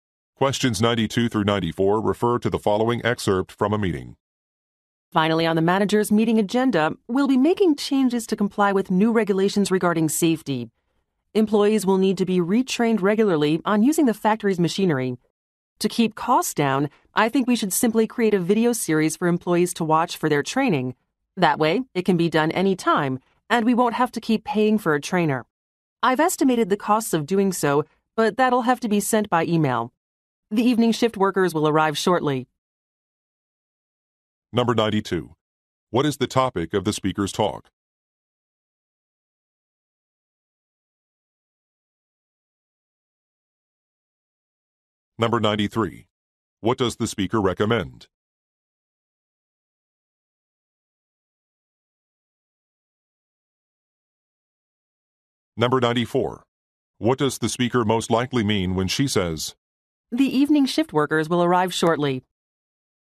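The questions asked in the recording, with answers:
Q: What is the topic of the speaker's talk?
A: Changes to comply with new safety regulations

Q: What does the speaker recommend?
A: Creating a training video series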